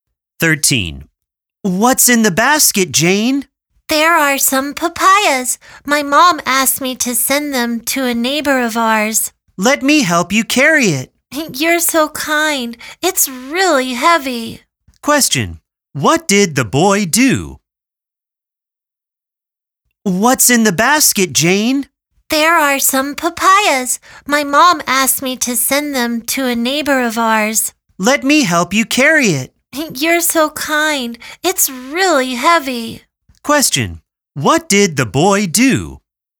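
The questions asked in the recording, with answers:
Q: Question, what did the boy do?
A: He helped Jane carry the basket of papayas.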